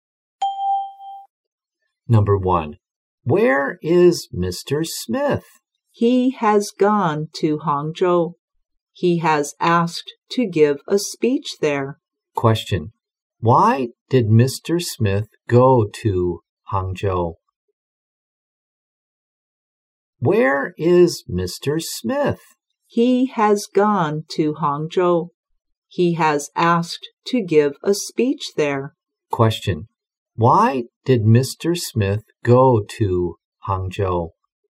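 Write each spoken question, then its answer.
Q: Why did Mr. Smith go to Hangzhou?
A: To give a speech there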